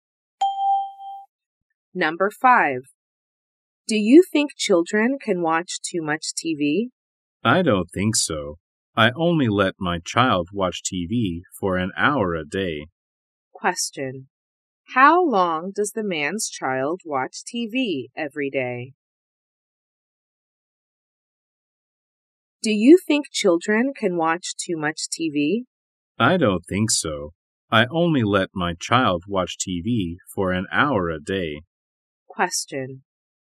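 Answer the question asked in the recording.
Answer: An hour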